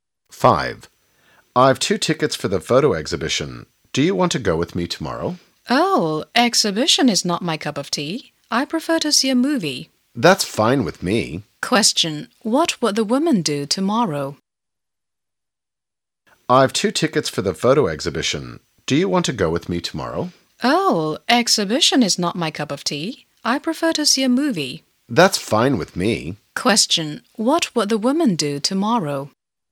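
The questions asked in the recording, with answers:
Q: Question: What will the woman do tomorrow?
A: See a movie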